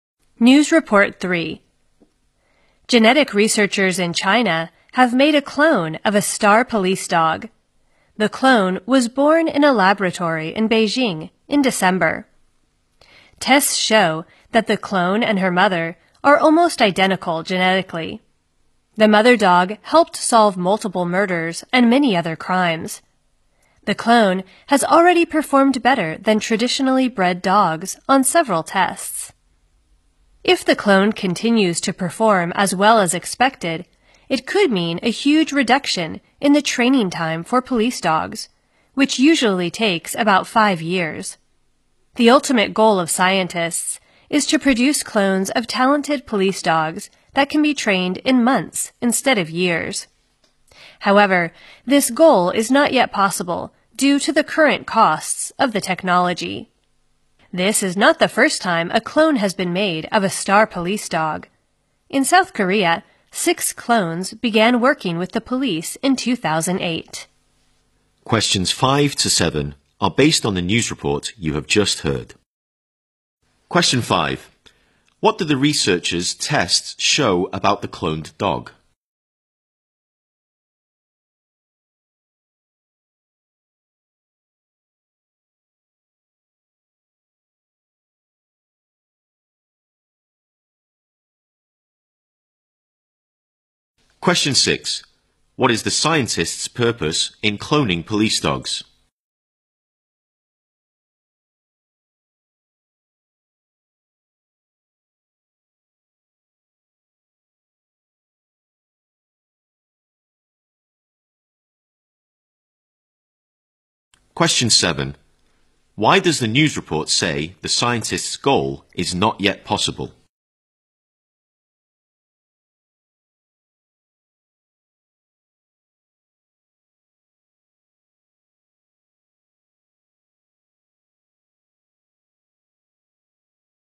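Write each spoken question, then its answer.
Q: What did the researchers' tests show about the cloned dog?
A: It is almost genetically identical to its mother

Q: What is the scientist's purpose in cloning police dogs?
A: To produce talented police dogs that can be trained in months instead of years

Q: Why does the news report say the scientist's goal is not yet possible?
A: The technology currently costs too much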